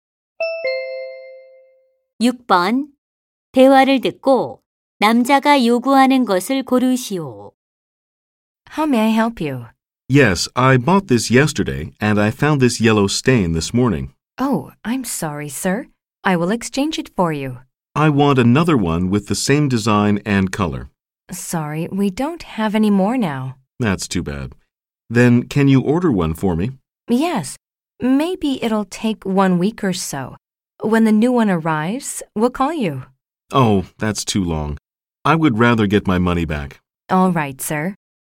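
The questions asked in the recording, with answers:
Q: 대화를 듣고 남자가 요구하는 것을 고르시오.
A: 환불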